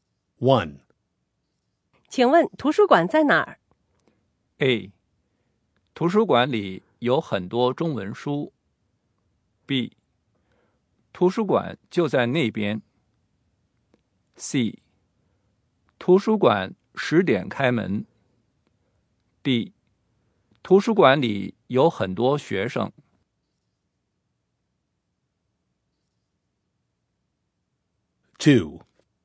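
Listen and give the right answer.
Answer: B: 图书馆就在那边。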